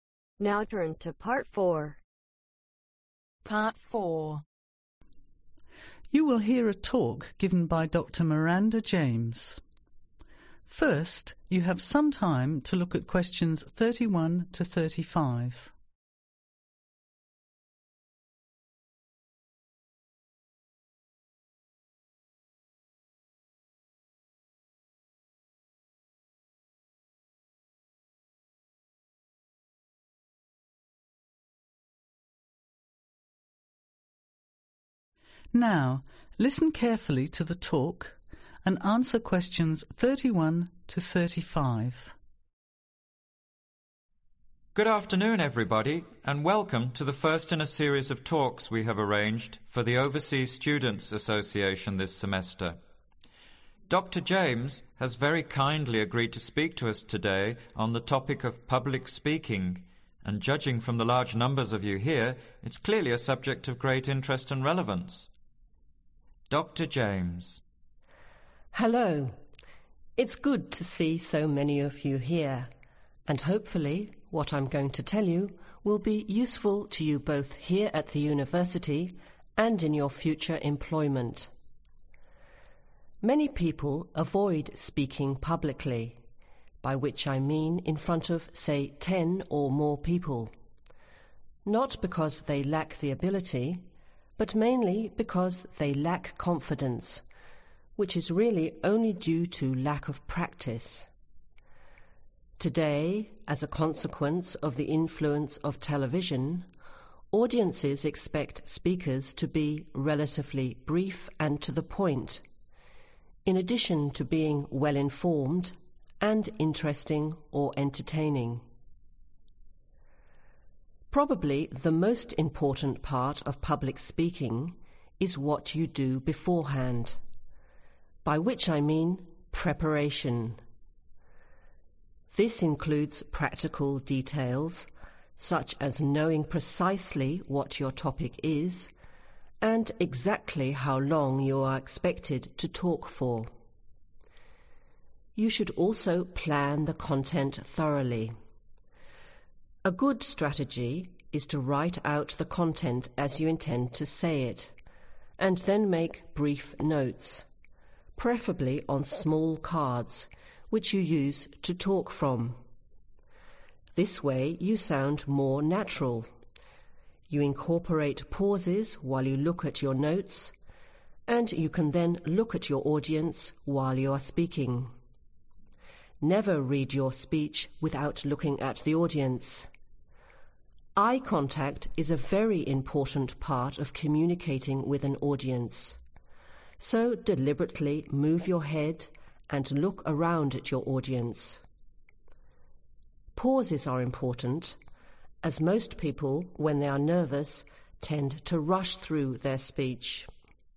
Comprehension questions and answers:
Complete the lecture notes below. Write ONE WORD ONLY for each answer.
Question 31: Public speaking means speaking to (31)............. or more people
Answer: Ten

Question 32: Lack of confidence usually due to lack of (32).............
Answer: Practice

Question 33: First part of public speaking is (33)............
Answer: Preparation

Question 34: This includes: (34)............ and length of talk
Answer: Topic

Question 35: (35)............. contact with the audience (very important)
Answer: Eye